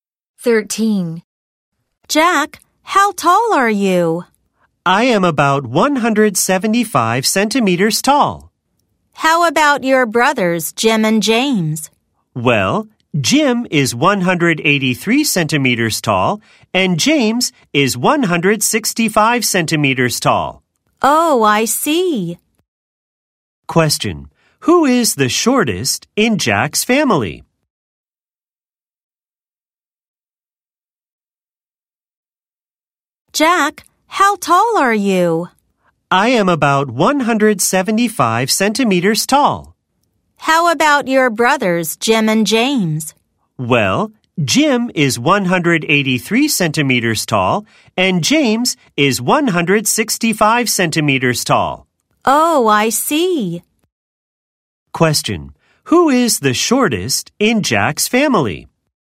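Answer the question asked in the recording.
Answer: James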